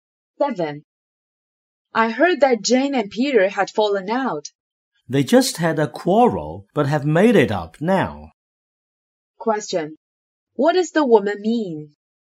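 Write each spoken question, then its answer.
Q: What does the woman mean?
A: Jane and Peter have made up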